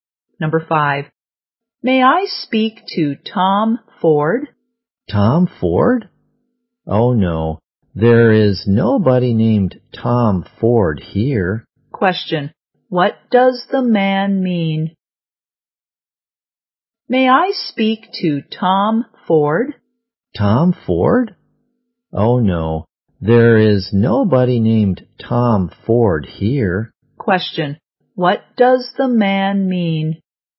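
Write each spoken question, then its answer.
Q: What does the man mean?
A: There is nobody named Tom Ford there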